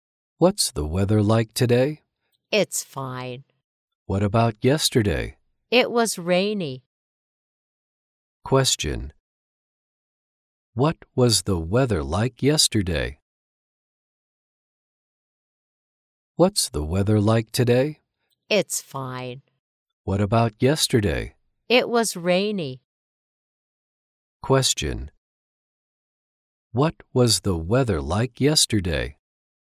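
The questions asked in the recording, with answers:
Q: What was the weather like yesterday?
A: Rainy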